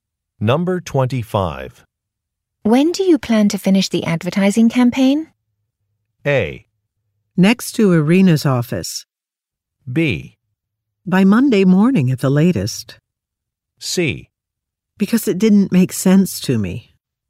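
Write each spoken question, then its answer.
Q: When do you plan to finish the advertising campaign?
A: B: By Monday morning at the latest.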